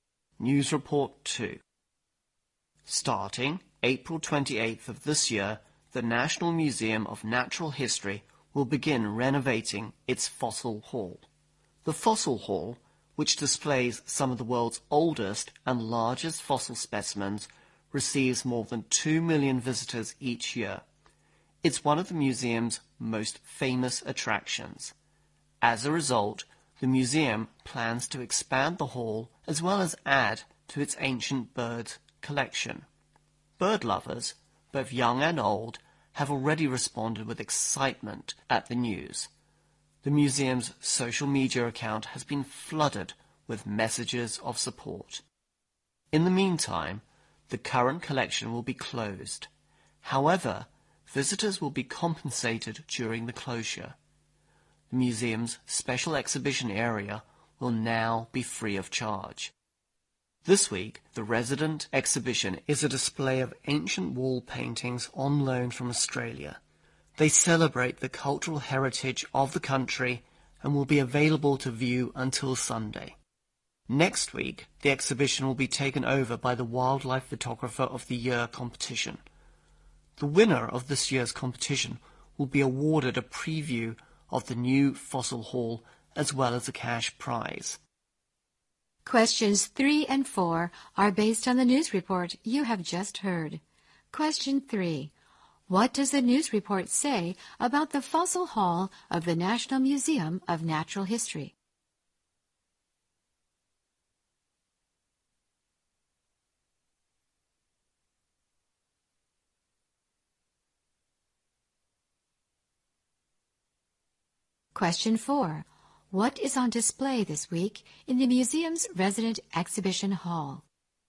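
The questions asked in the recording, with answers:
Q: What does the news report say about the Fossil Hall of the National Museum of Natural History?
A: It will be renovated and expanded starting April 28

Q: What is on display this week in the museum's resident exhibition hall?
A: Ancient wall paintings on loan from Australia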